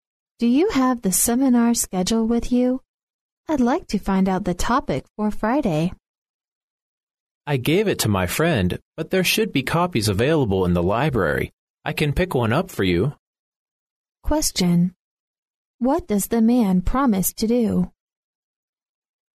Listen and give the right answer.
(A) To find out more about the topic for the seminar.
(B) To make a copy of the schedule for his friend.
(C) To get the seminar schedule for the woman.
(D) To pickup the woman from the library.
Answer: (C) To get the seminar schedule for the woman.

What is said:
[听力原文] W: Do you have the seminar schedule with you? I'd like to find out the topic for Friday. M: I gave it to my friend, but there should be copies available in the library. I can pick one up for you. Q: What does the man promise to do?